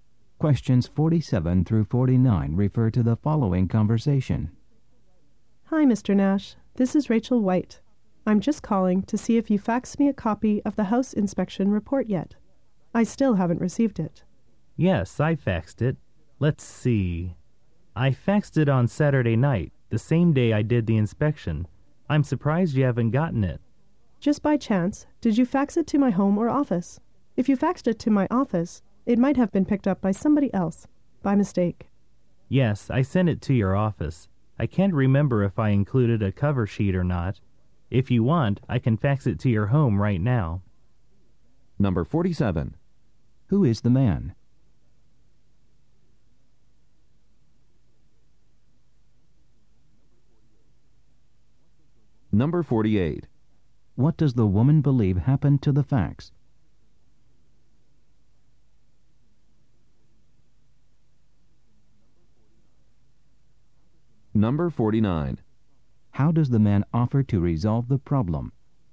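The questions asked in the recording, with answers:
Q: Who is the man?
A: A house inspector

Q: What does the woman believe happened to the fax?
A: Someone else at her office picked it up by mistake

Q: How does the man offer to resolve the problem?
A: Fax it to her home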